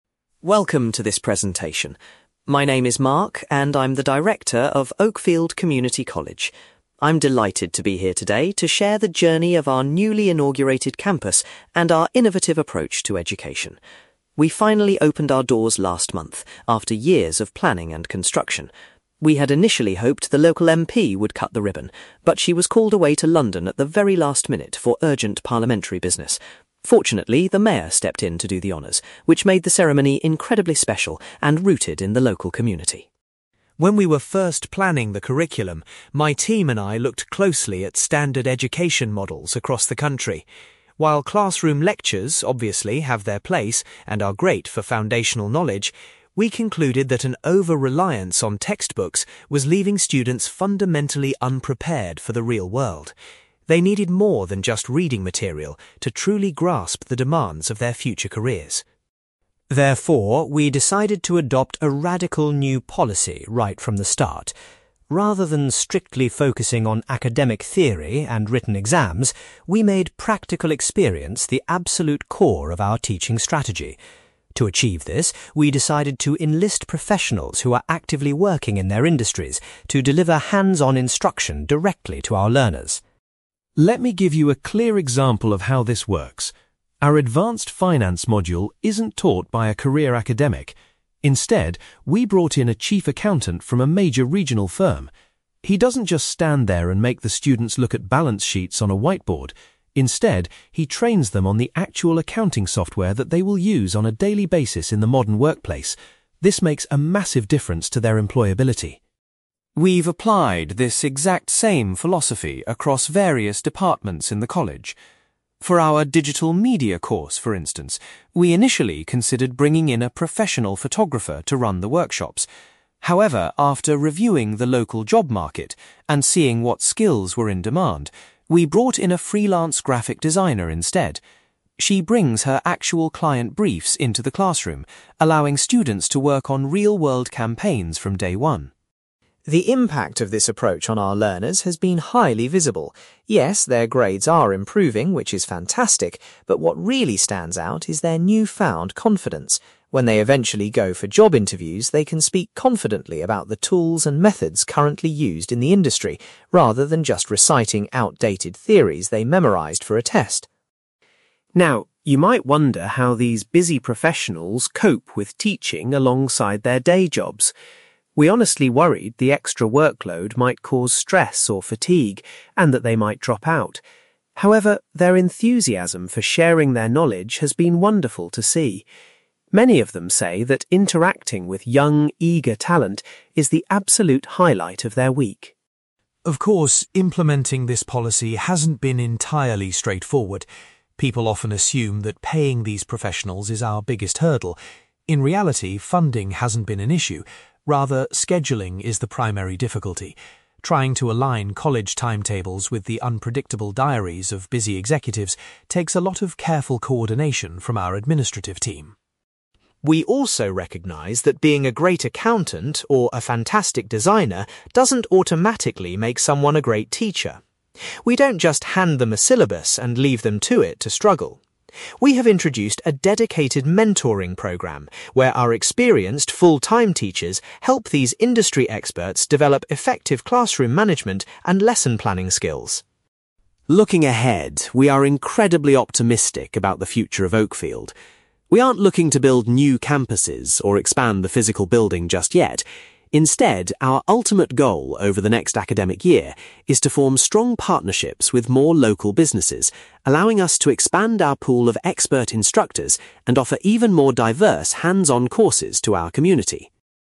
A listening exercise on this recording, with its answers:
For questions 9-18, complete the sentences with a word or short phrase.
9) Mark was pleased that the (9)........................... was able to officially open the new college.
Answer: mayor

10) Mark felt that traditional courses depended too heavily on (10)........................... for their learning materials.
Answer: textbooks

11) The college's new policy prioritises giving students (11)........................... rather than just academic theory.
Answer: practical experience

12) The chief accountant focuses on teaching students how to use the (12)........................... required in the modern workplace.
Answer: software

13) A local (13)........................... uses real client tasks to instruct students in the digital media course.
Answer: graphic designer

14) Mark notes that students are performing exceptionally well in (14)........................... because of their new skills.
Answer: job interviews

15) Mark was pleasantly surprised by the (15)........................... shown by the industry professionals towards teaching.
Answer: enthusiasm

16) Mark admits that (16)........................... has been the most significant challenge in managing the new instructors.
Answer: scheduling

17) The college has established a (17)........................... to support professionals who lack teaching experience.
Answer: mentoring program

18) Mark hopes to collaborate with a wider range of (18)........................... in the upcoming academic year.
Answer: local businesses

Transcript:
Mark: Welcome to this presentation. My name is Mark, and I'm the director of Oakfield Community College. I'm delighted to be here today to share the journey of our newly inaugurated campus and our innovative approach to education. We finally opened our doors last month after years of planning and construction. We had initially hoped the local MP would cut the ribbon, but she was called away to London at the very last minute for urgent parliamentary business. Fortunately, the mayor stepped in to do the honours, which made the ceremony incredibly special and rooted in the local community.
When we were first planning the curriculum, my team and I looked closely at standard education models across the country. While classroom lectures obviously have their place and are great for foundational knowledge, we concluded that an over-reliance on textbooks was leaving students fundamentally unprepared for the real world. They needed more than just reading material to truly grasp the demands of their future careers.
Therefore, we decided to adopt a radical new policy right from the start. Rather than strictly focusing on academic theory and written exams, we made practical experience the absolute core of our teaching strategy. To achieve this, we decided to enlist professionals who are actively working in their industries to deliver hands-on instruction directly to our learners.
Let me give you a clear example of how this works. Our advanced finance module isn't taught by a career academic. Instead, we brought in a chief accountant from a major regional firm. He doesn't just stand there and make the students look at balance sheets on a whiteboard; instead, he trains them on the actual accounting software that they will use on a daily basis in the modern workplace. This makes a massive difference to their employability.
We've applied this exact same philosophy across various departments in the college. For our digital media course, for instance, we initially considered bringing in a professional photographer to run the workshops. However, after reviewing the local job market and seeing what skills were in demand, we brought in a freelance graphic designer instead. She brings her actual client briefs into the classroom, allowing students to work on real-world campaigns from day one.
The impact of this approach on our learners has been highly visible. Yes, their grades are improving, which is fantastic, but what really stands out is their newfound confidence. When they eventually go for job interviews, they can speak confidently about the tools and methods currently used in the industry, rather than just reciting outdated theories they memorised for a test.
Now, you might wonder how these busy professionals cope with teaching alongside their day jobs. We honestly worried the extra workload might cause stress or fatigue, and that they might drop out. However, their enthusiasm for sharing their knowledge has been wonderful to see. Many of them say that interacting with young, eager talent is the absolute highlight of their week.
Of course, implementing this policy hasn't been entirely straightforward. People often assume that paying these professionals is our biggest hurdle. In reality, funding hasn't been an issue. Rather, scheduling is the primary difficulty. Trying to align college timetables with the unpredictable diaries of busy executives takes a lot of careful coordination from our administrative team.
We also recognise that being a great accountant or a fantastic designer doesn't automatically make someone a great teacher. We don't just hand them a syllabus and leave them to it to struggle. We have introduced a dedicated mentoring program where our experienced, full-time teachers help these industry experts develop effective classroom management and lesson planning skills.
Looking ahead, we are incredibly optimistic about the future of Oakfield. We aren't looking to build new campuses or expand the physical building just yet. Instead, our ultimate goal over the next academic year is to form strong partnerships with more local businesses, allowing us to expand our pool of expert instructors and offer even more diverse hands-on courses to our community.

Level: B2